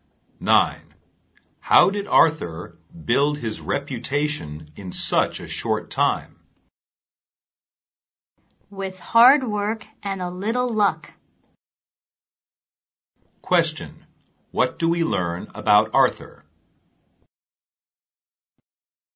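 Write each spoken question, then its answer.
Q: What do we learn about Arthur?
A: He built his reputation with hard work and a little luck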